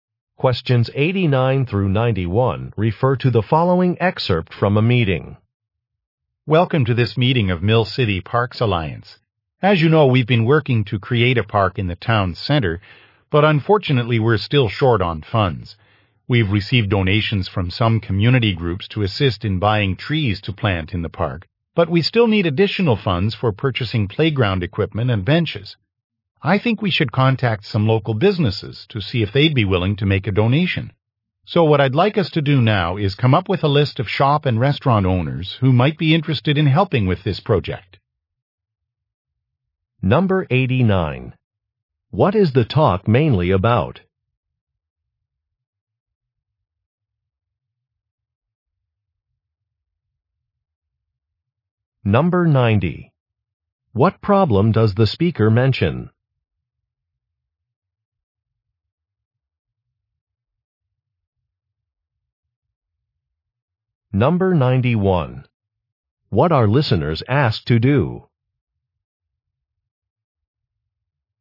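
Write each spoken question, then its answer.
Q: What is the talk mainly about?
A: Raising money for a new town park

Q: What problem does the speaker mention?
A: There is not enough money

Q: What are listeners asked to do?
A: Make a list of local businesses that might donate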